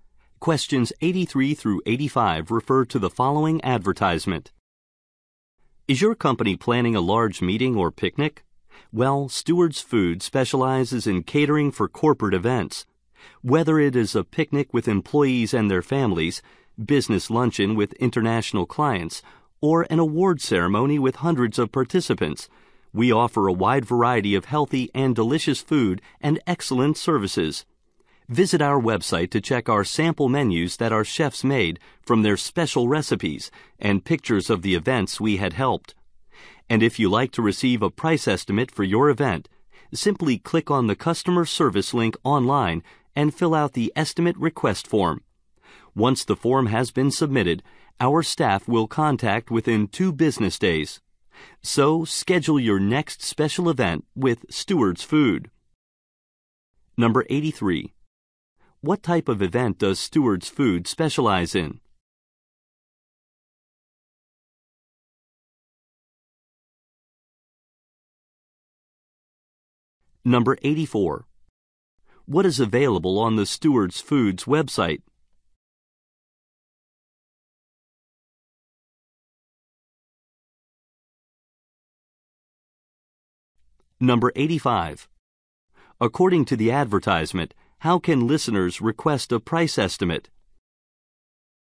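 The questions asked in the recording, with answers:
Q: What type of event does Stewards Food specialize in?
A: Corporate events

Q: What is available on the Stewards Foods website?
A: Sample menus and pictures of past events

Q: According to the advertisement, how can listeners request a price estimate?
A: By filling out the estimate request form online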